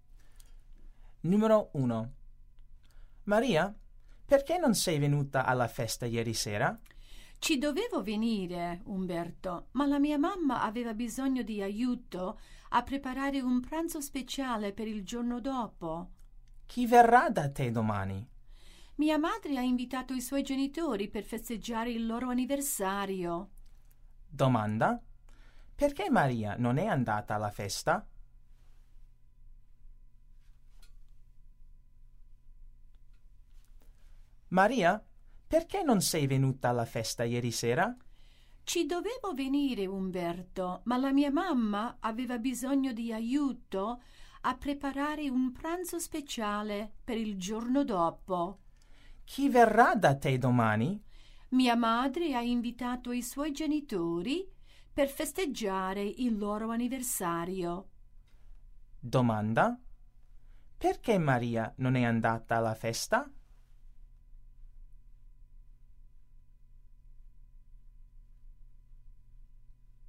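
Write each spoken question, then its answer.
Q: Perché Maria non è andata alla festa?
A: Doveva aiutare la mamma a preparare un pranzo speciale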